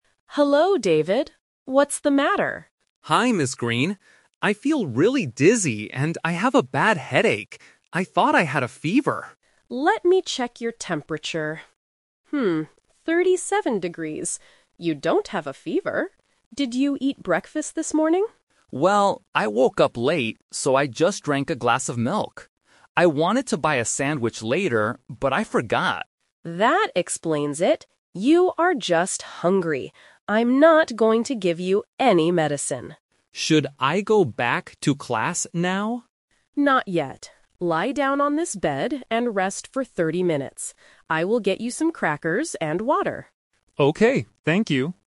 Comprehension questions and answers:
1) Why does David feel sick?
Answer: He didn't eat enough for breakfast.

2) What did David have for breakfast this morning?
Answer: He just had some milk.

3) What does the nurse tell David to do next?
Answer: Rest on a bed for half an hour.

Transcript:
Nurse: Hello, David. What's the matter?
Green. I feel really dizzy and I have a bad headache. I thought I had a fever.
Nurse: Let me check your temperature. 37 degrees. You don't have a fever. Did you eat breakfast this morning?
David: Well, I woke up late, so I just drank a glass of milk. I wanted to buy a sandwich later, but I forgot.
Nurse: That explains it. You are just hungry. I'm not going to give you any medicine.
David: Should I go back to class now?
Nurse: Not yet. Lie down on this bed and rest for 30 minutes. I will get you some crackers and water.